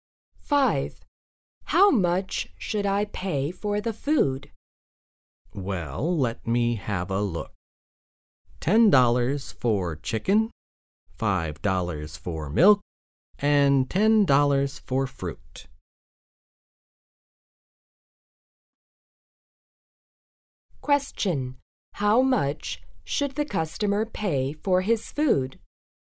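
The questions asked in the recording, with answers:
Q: How much should the customer pay for his food?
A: $25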